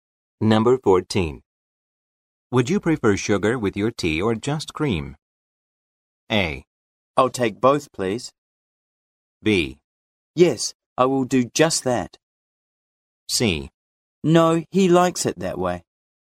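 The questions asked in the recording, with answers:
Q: Would you prefer sugar with your tea or just cream?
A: A: I'll take both, please.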